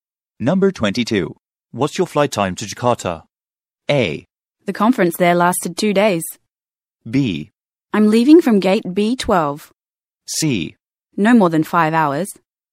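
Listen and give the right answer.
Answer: C: No more than 5 hours.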